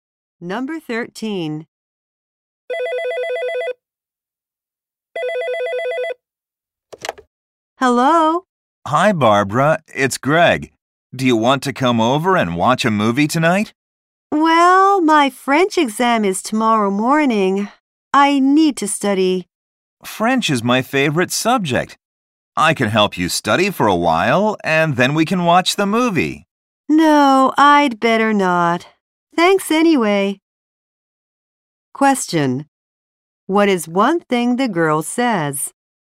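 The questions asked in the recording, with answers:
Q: What is one thing the girl says?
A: She needs to study for her French exam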